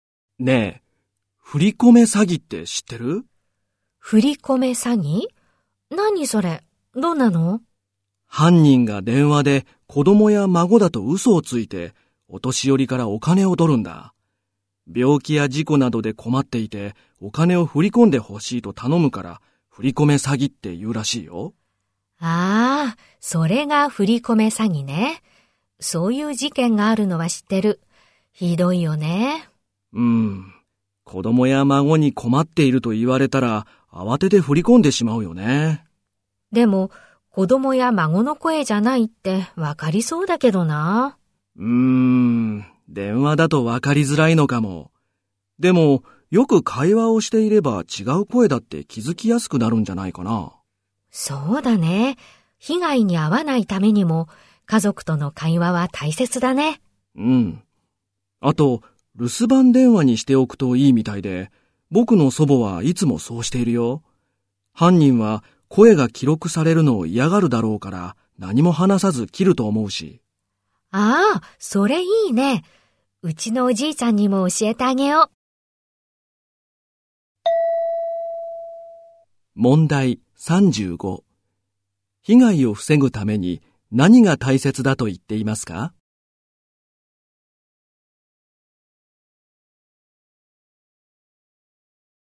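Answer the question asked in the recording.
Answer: 家族との会話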